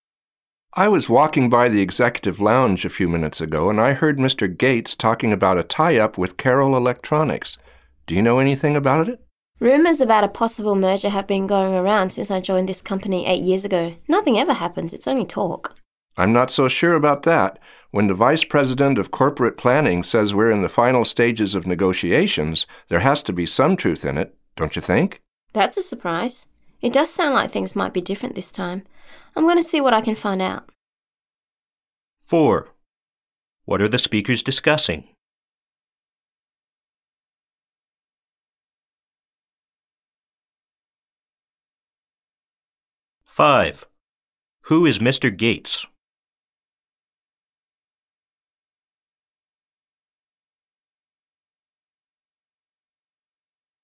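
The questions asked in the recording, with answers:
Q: What are the speakers discussing?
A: A possible merger with Carroll Electronics

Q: Who is Mr. Gates?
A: The Vice President of Corporate Planning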